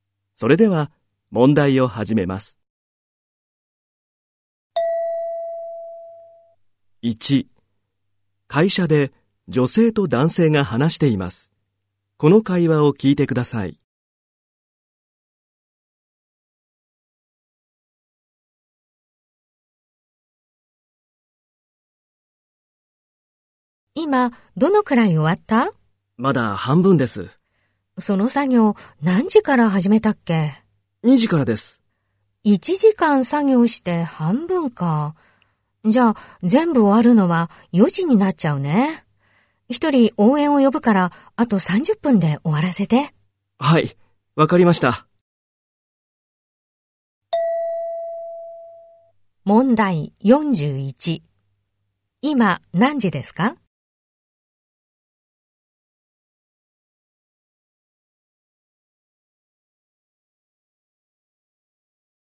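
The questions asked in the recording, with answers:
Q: 今、何時ですか?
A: 3時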